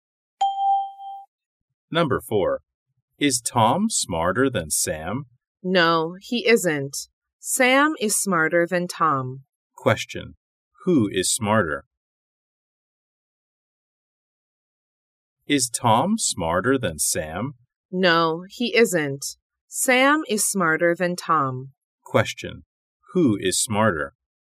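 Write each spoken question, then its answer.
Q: Who is smarter?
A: Sam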